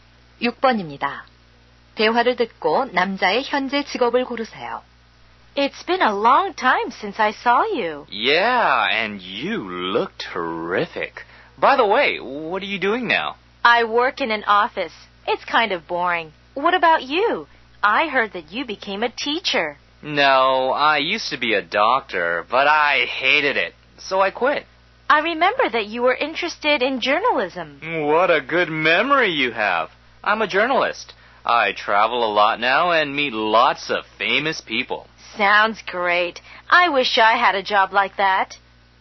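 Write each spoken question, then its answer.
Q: 대화를 듣고 남자의 현재 직업을 고르세요.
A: 기자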